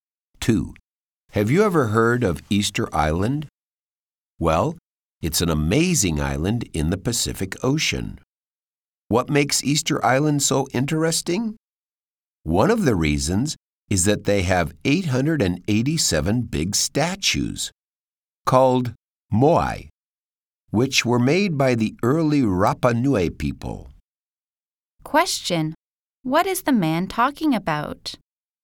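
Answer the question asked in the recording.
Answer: Easter Island and its Moai statues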